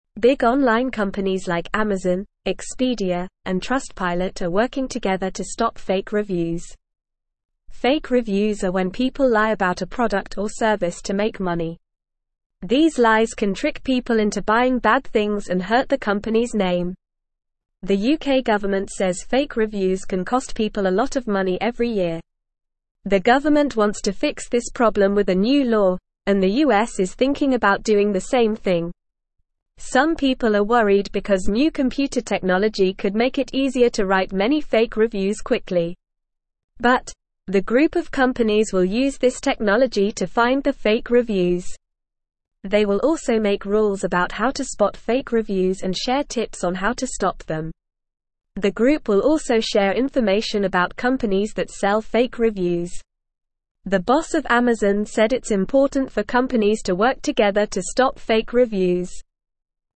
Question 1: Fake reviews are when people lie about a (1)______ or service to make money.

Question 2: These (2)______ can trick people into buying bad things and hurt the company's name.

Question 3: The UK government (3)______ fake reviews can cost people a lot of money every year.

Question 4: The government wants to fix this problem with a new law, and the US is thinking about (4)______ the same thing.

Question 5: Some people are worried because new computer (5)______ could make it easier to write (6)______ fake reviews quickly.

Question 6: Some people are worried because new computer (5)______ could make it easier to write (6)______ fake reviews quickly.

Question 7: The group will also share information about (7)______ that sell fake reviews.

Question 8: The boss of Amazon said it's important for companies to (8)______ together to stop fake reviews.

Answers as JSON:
{"1": "product", "2": "lies", "3": "says", "4": "doing", "5": "technology", "6": "many", "7": "companies", "8": "work"}

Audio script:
Big online companies like Amazon, Expedia, and Trustpilot are working together to stop fake reviews. Fake reviews are when people lie about a product or service to make money. These lies can trick people into buying bad things and hurt the company's name. The UK government says fake reviews can cost people a lot of money every year. The government wants to fix this problem with a new law, and the US is thinking about doing the same thing.
Some people are worried because new computer technology could make it easier to write many fake reviews quickly. But, the group of companies will use this technology to find the fake reviews. They will also make rules about how to spot fake reviews and share tips on how to stop them. The group will also share information about companies that sell fake reviews. The boss of Amazon said it's important for companies to work together to stop fake reviews.

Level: Level 1